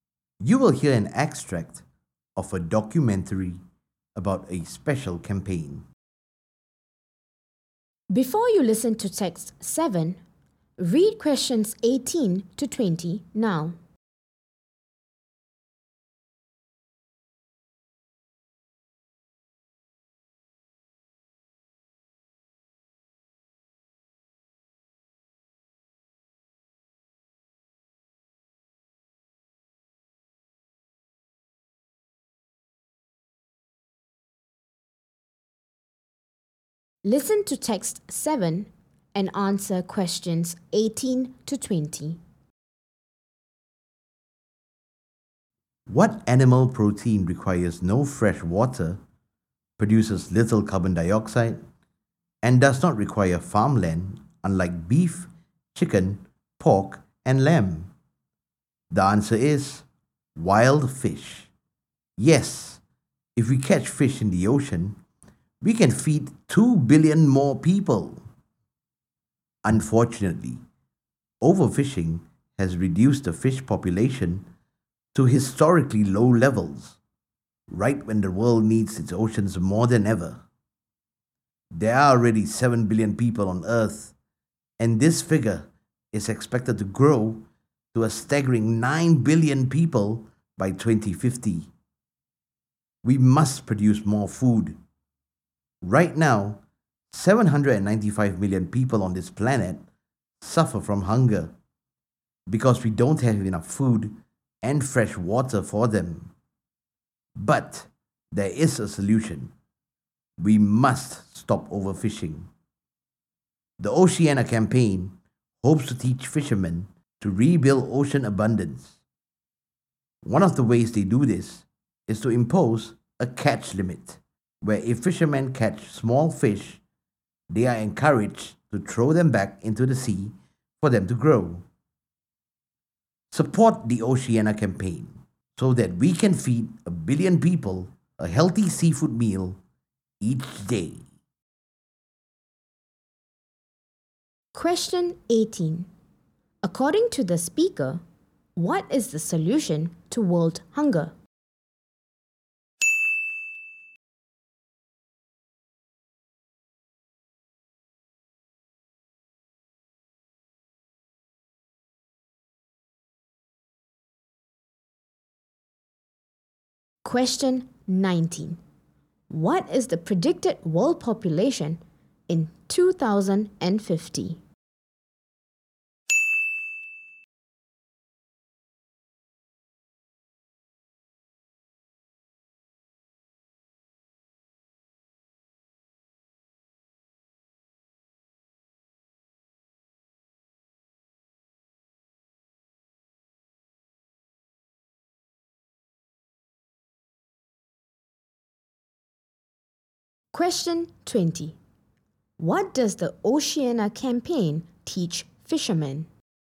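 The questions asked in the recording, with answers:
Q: According to the speaker, what is the solution to world hunger?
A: Stop overfishing

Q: What is the predicted world population in 2050?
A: 9 billion people

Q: What does the Oceana campaign teach fishermen?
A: To rebuild ocean abundance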